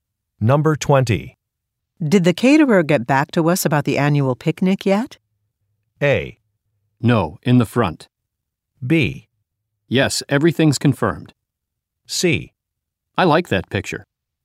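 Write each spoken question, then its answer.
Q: Did the caterer get back to us about the annual picnic yet?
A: B: Yes, everything's confirmed.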